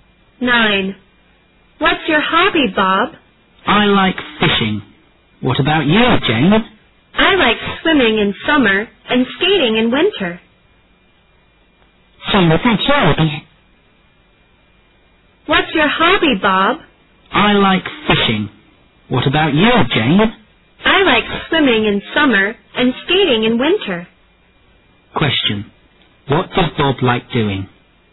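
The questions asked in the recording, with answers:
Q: What does Bob like doing?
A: Fishing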